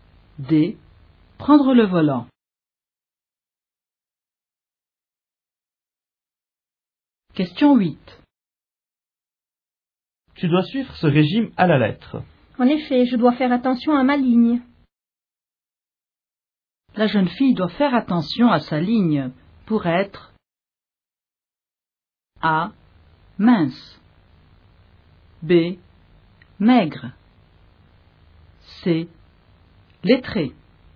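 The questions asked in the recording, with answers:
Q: La jeune fille doit faire attention à sa ligne pour être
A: A: Mince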